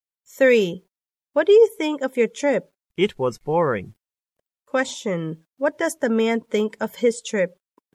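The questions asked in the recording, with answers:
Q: What does the man think of his trip?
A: It was boring.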